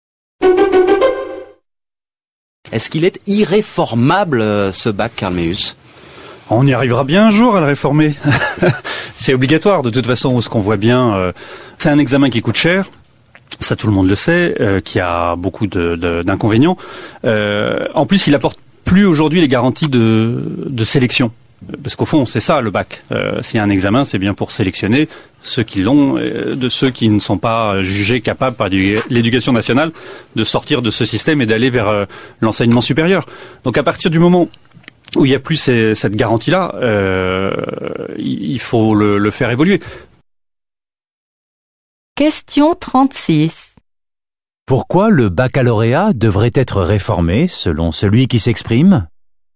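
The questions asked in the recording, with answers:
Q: Pourquoi le baccalauréat devrait être réformé selon celui qui s'exprime?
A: Il ne garantit plus la sélection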